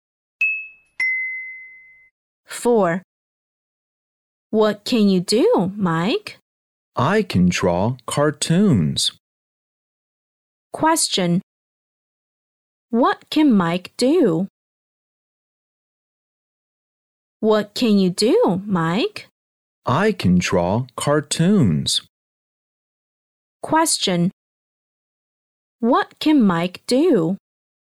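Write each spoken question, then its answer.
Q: What can Mike do?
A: He can draw cartoons.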